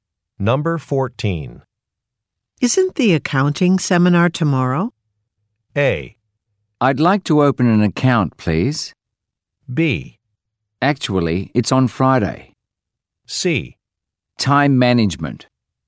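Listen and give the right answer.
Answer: B: Actually, it's on Friday.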